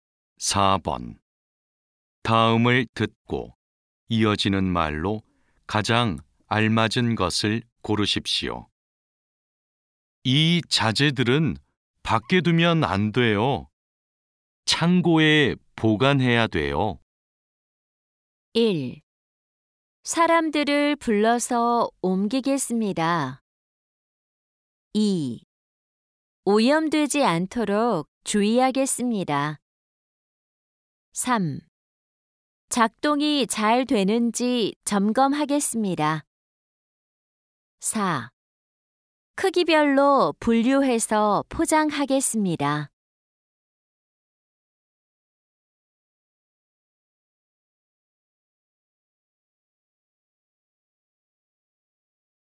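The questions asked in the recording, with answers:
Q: 다음을 듣고 이어지는 말로 가장 알맞은 것을 고르십시오.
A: 1: 사람들을 불러서 옮기겠습니다.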